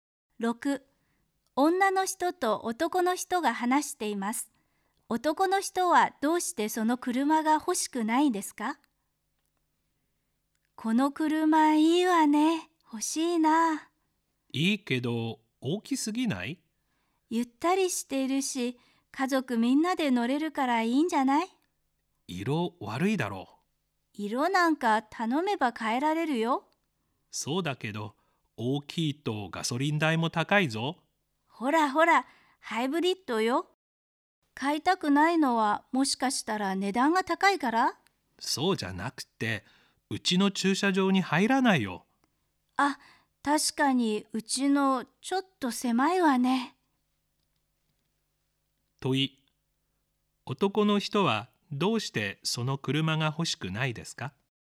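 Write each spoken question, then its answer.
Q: 問い、男の人はどうしてその車が欲しくないですか?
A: 家の駐車場に入らないから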